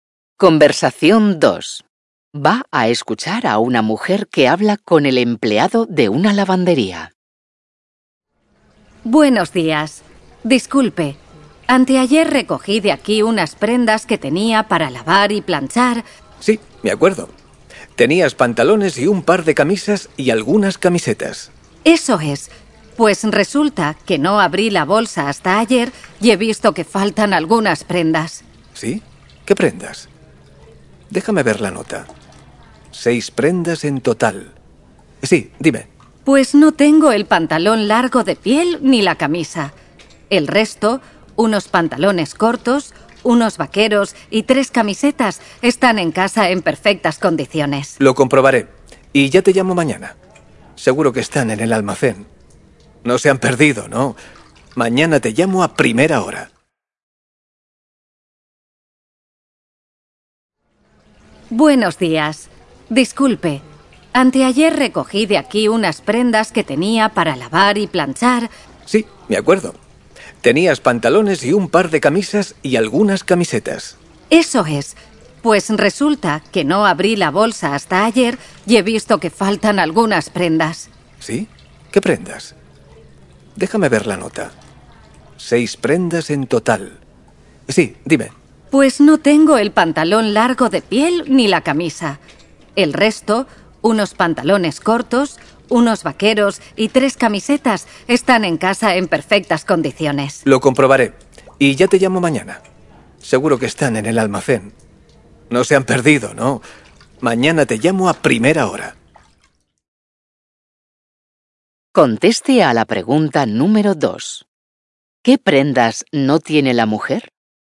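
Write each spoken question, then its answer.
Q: ¿Qué prendas no tiene la mujer?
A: El pantalón largo de piel y la camisa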